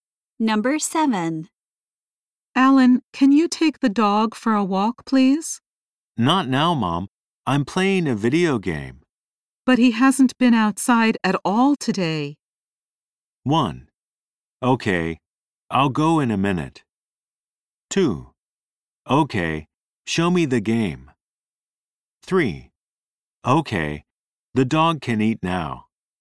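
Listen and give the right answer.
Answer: 1: Okay, I'll go in a minute.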